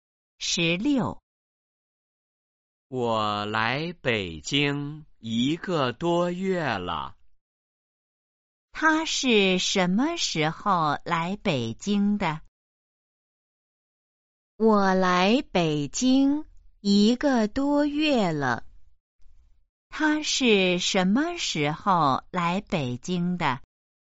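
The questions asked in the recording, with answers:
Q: 他是什么时候来北京的?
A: 一个多月前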